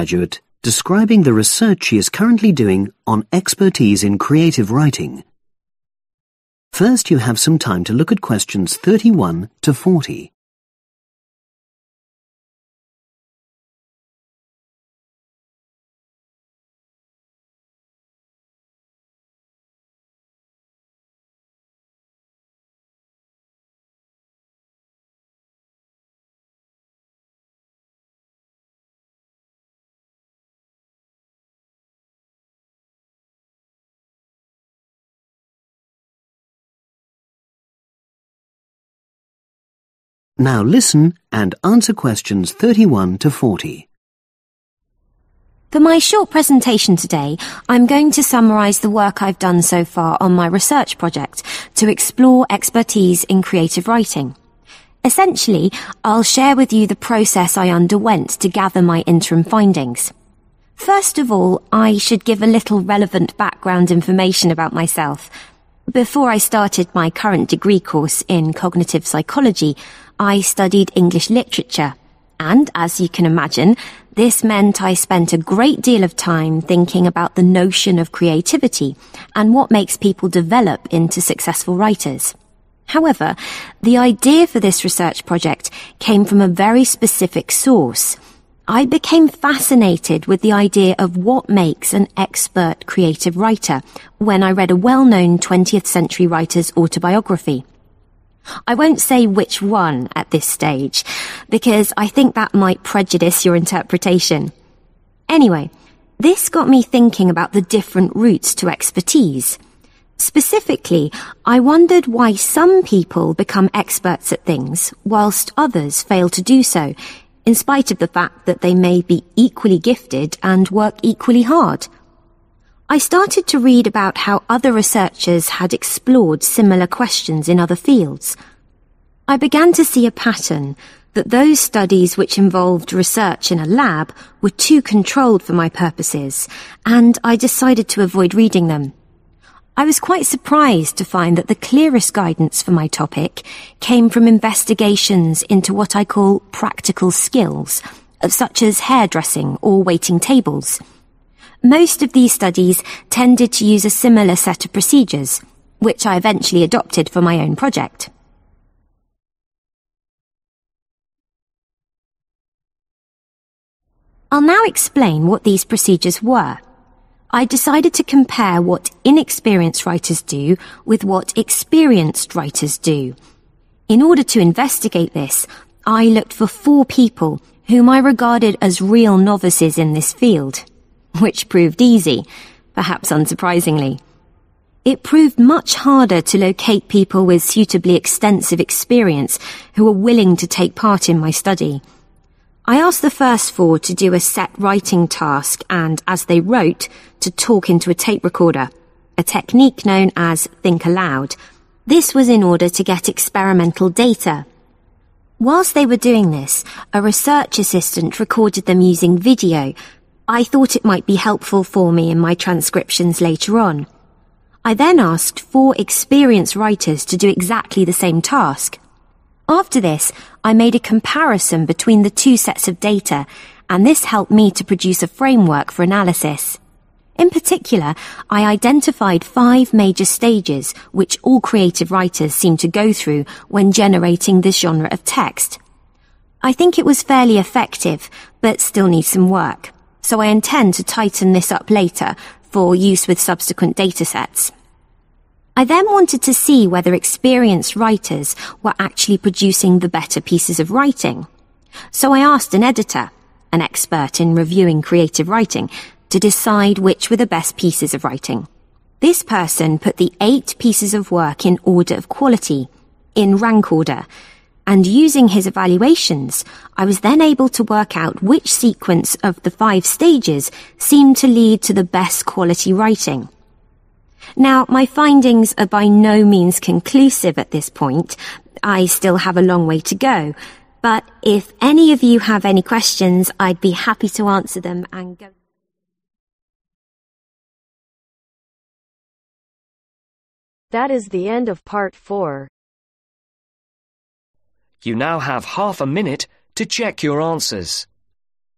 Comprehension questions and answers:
Complete the notes below. Write ONE WORD ONLY for each answer.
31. Background – researcher had previously studied (31) ............ literature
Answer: English

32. Had initial idea for research – inspired by a book (the (32) ............ of a famous novelist).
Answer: Autobiography

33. Avoided studies conducted in a (33) ............ because too controlled.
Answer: laboratory

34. Most helpful studies – research into practical (34) ............, e.g. waiting tables.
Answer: skills

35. Found participants: four true (35) ............ beginners in creative writing (easy to find) and four with extensive experience.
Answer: novices

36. Using "think aloud" techniques, gathered (36) ............ data from inexperienced writer.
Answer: experimental

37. (During session – assistant made (37) ............ recordings).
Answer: video

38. Compared two data sets and generated a (38) ............ for analysis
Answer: framework

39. Got an expert (39) ............ to evaluate quality of the different product.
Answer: editor

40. Identified the most effective (40) ............ of stages in producing text.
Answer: sequence